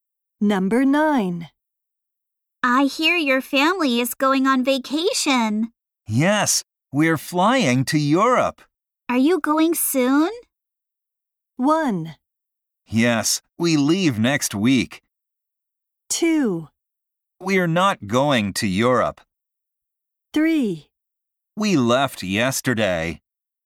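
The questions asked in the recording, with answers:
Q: Are you going soon?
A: 1: Yes, we leave next week.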